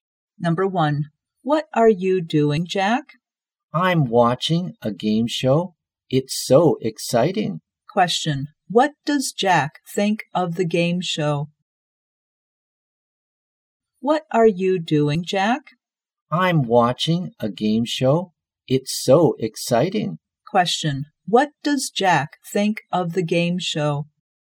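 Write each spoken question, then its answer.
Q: what does Jack think of the game show?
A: It's exciting.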